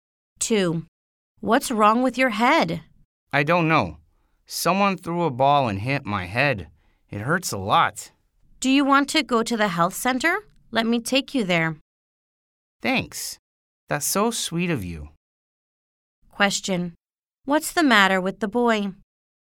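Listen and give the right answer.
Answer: Someone threw a ball and hit his head, and it hurts a lot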